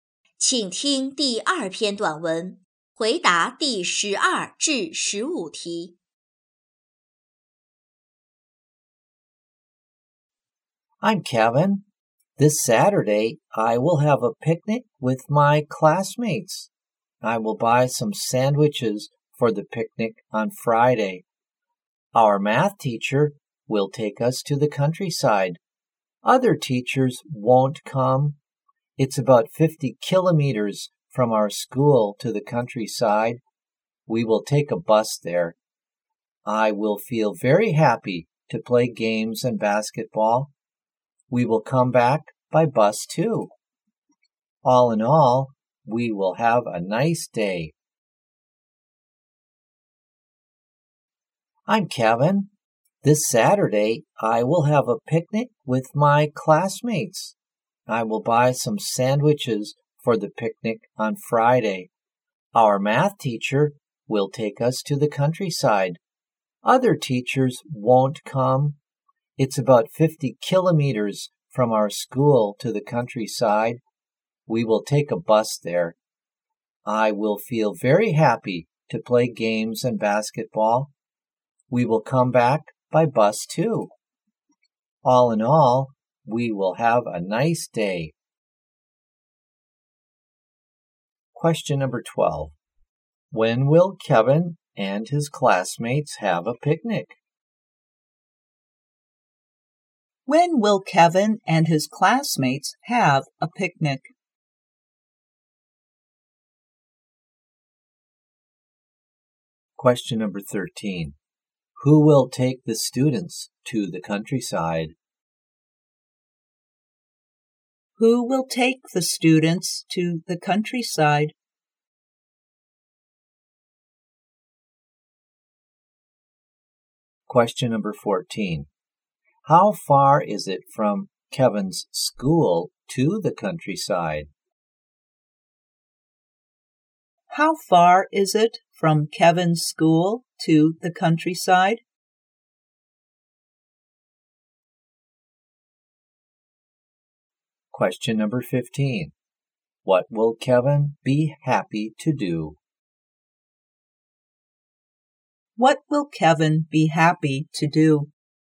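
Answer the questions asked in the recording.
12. This Saturday
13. Their math teacher
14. About 50 kilometers
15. Play games and basketball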